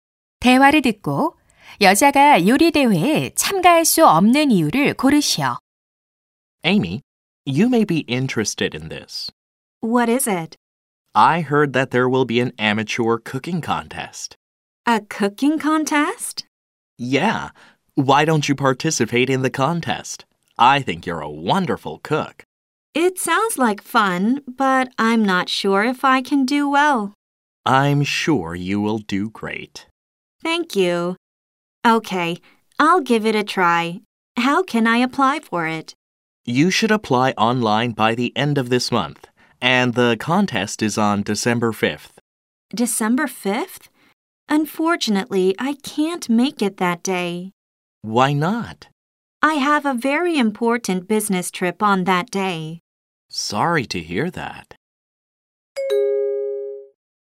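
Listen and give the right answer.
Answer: 그날 중요한 출장이 있어서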